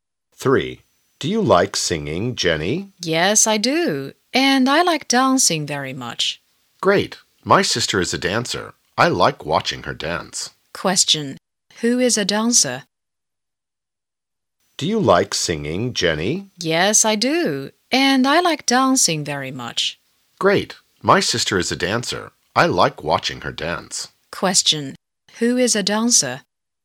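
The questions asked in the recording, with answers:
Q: Question. Who is a dancer?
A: The sister of the person talking to Jenny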